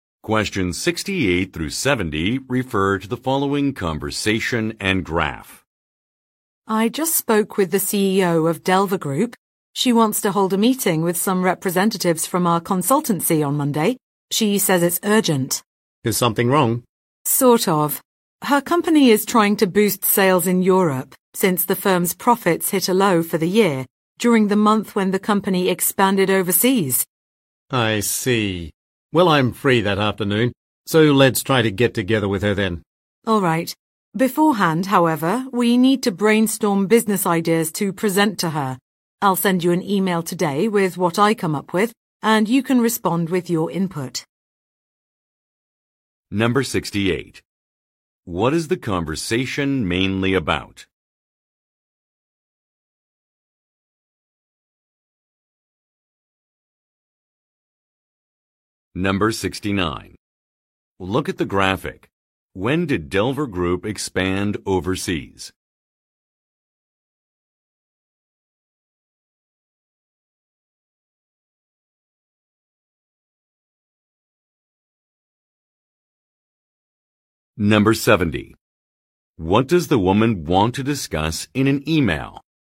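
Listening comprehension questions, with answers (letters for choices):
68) What is the conversation mainly about?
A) A consulting fee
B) An upcoming meeting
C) An urgent report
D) A promotional event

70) What does the woman want to discuss in an e-mail?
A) Customer feedback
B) Business advice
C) Expansion locations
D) Company policies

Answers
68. B
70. B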